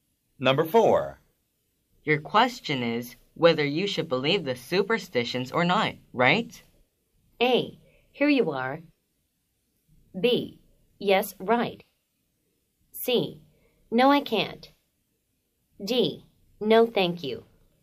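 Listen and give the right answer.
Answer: B: Yes, right.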